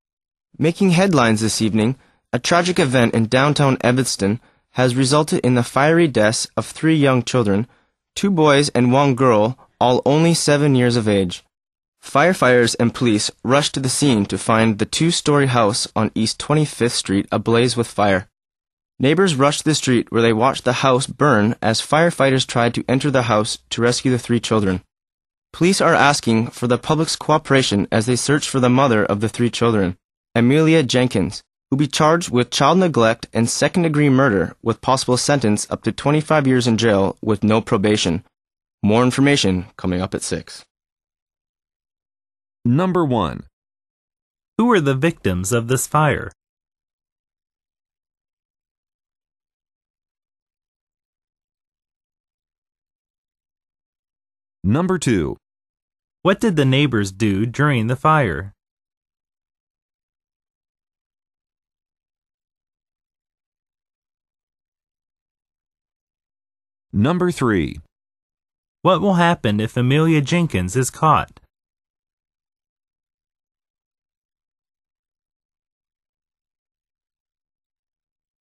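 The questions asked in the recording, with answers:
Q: Who are the victims of this fire?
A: Three seven-year-old children, two boys and a girl

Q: What did the neighbors do during the fire?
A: They watched the house burn

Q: What will happen if Amelia Jenkins is caught?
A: She will be charged with child neglect and second-degree murder, facing up to 25 years in jail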